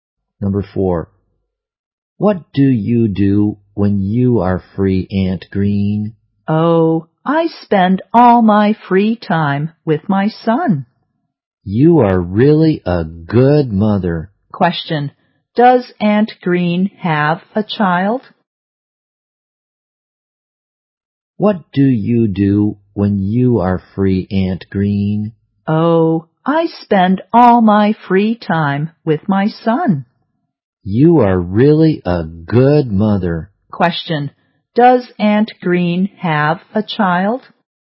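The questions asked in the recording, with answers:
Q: Does Aunt Green have a child?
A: Yes, a son.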